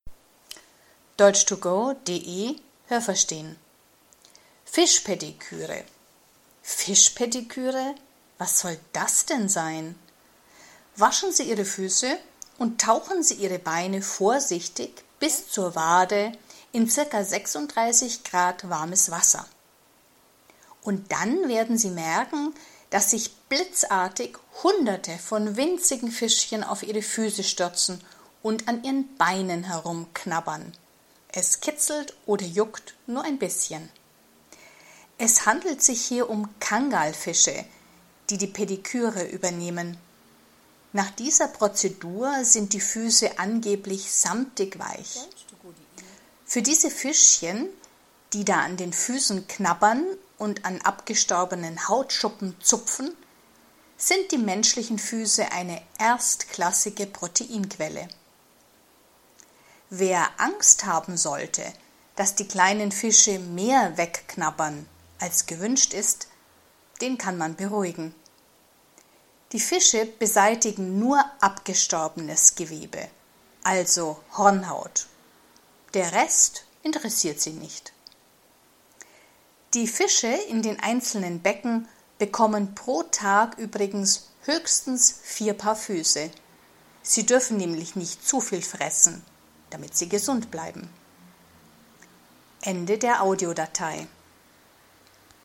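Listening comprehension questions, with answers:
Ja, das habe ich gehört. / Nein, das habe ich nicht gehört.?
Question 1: Wenn die Fische an den Beinen knabbern, merkt man nichts davon, so zart machen sie das.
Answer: Nein, das habe ich nicht gehört.

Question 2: Die Fische stürzen sich auf die menschlichen Beine, weil sie sich für das Eiweiß interessieren.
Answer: Ja, das habe ich gehört.

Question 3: Die Fische interessieren sich nur für samtig weiche Beine.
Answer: Nein, das habe ich nicht gehört.

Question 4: Wenn die Fische die Hornhaut essen, stirbt sie ab.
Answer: Nein, das habe ich nicht gehört.

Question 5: In jedem Becken werden pro Tag höchstens acht Menschen behandelt.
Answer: Nein, das habe ich nicht gehört.

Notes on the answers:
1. Man merkt etwas, denn es kitzelt oder juckt ein bisschen.
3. Sie interessieren sich für die Hautschuppen; erst nachdem die Fische sie gefressen haben, sind die Beine glatt.
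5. In jedem Becken werden höchstens vier Paar Füße behandelt, also nur vier Menschen.

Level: C1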